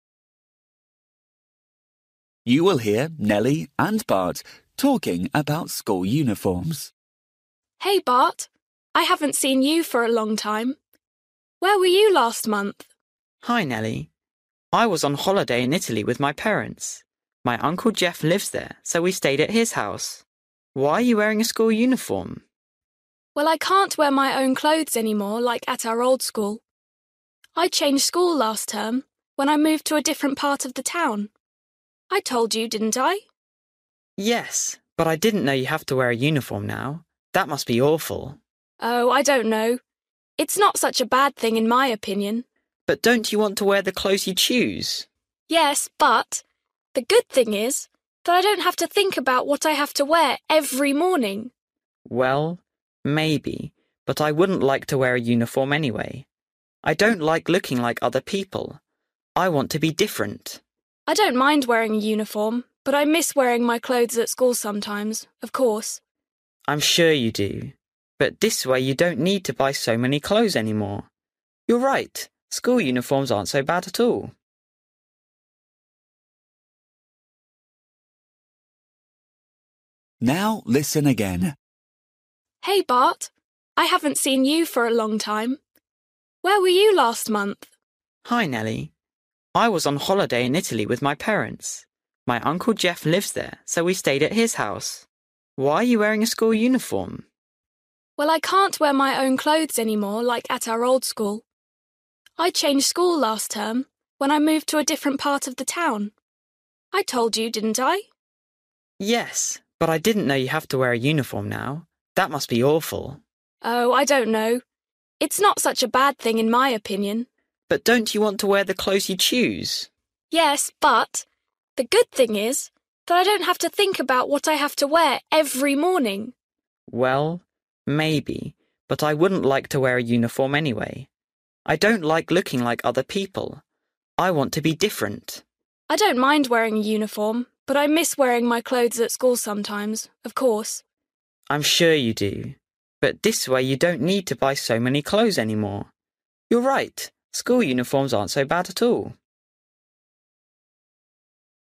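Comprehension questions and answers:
For each question, choose the correct answer.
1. Why have Nelly and Bart not met for a long time?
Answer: Bart was on holiday in Italy with his parents.

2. Why is Nelly wearing a school uniform?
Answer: She changed to a new school where uniforms are required.

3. What does Nelly think about uniforms?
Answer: They're not so bad; she doesn't have to think about what to wear every morning.

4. Why doesn't Bart like uniforms?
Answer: He doesn't like looking like other people; he wants to be different.

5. How does Nelly feel about her clothes?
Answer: She sometimes misses wearing her own clothes at school.

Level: Luyện nghe trình độ A2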